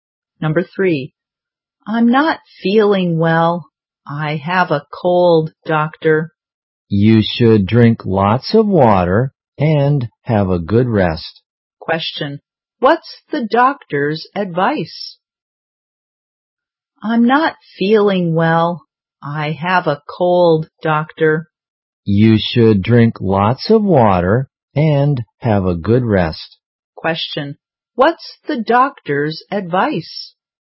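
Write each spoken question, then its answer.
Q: what's the doctor's advice?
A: Drink lots of water and have a good rest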